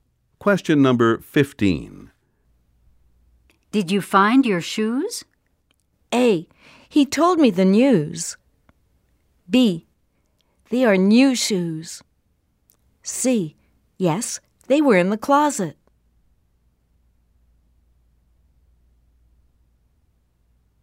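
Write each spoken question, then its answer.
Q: Did you find your shoes?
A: C: Yes, they were in the closet.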